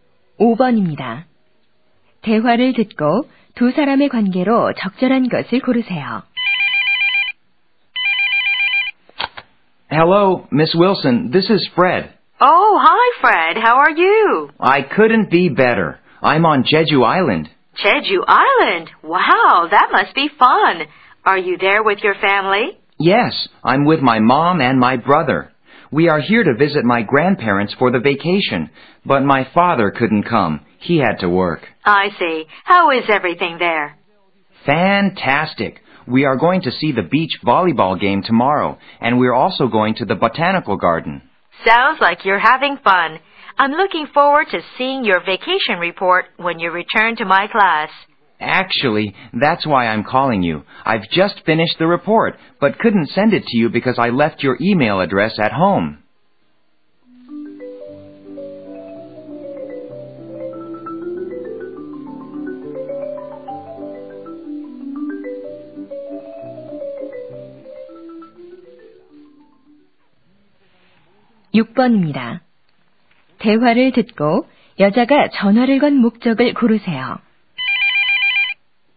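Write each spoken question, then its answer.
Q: 대화를 듣고 두 사람의 관계로 적절한 것을 고르세요.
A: 교사와 학생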